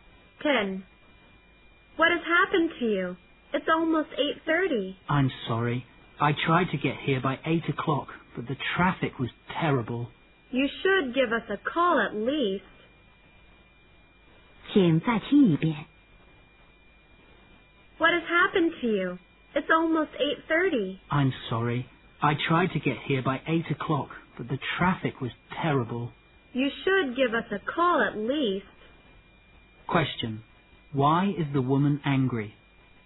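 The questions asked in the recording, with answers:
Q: Why is the woman angry?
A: The man was late and didn't call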